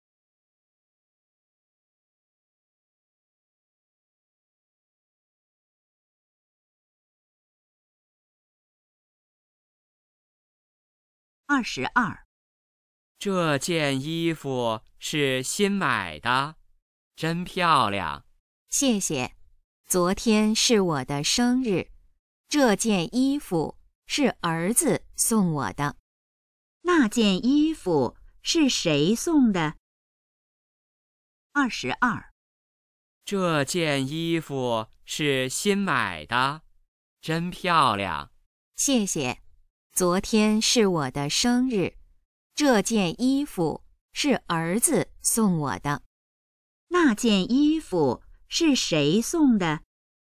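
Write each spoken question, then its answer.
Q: 那件衣服是谁送的?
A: 儿子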